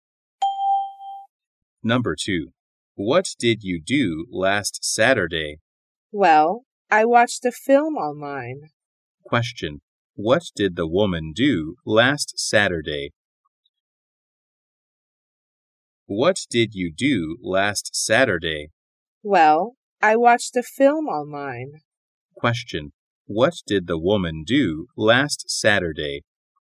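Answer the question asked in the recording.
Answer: She watched a film online.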